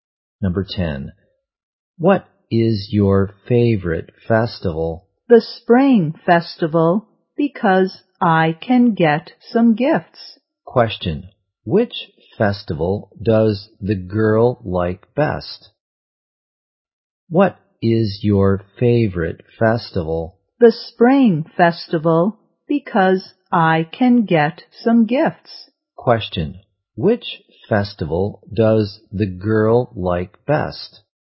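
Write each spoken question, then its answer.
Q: Which festival does the girl like best?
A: The Spring Festival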